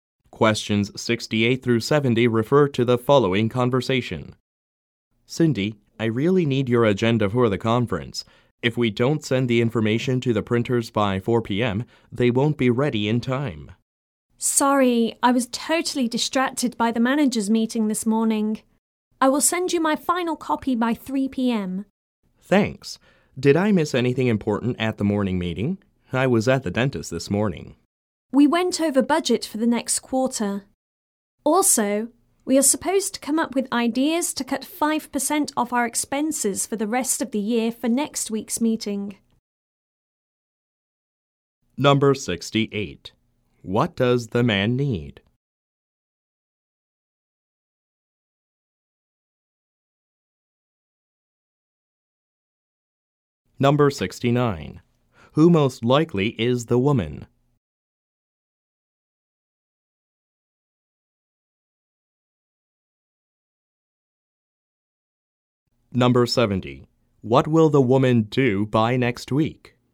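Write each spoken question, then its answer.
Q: What does the man need?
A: Cindy's agenda for the conference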